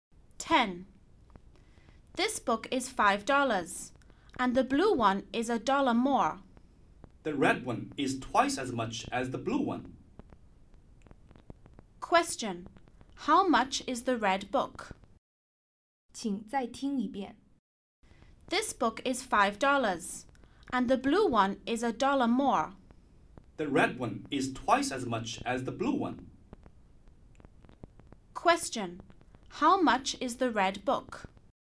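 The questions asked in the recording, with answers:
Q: How much is the red book?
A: $12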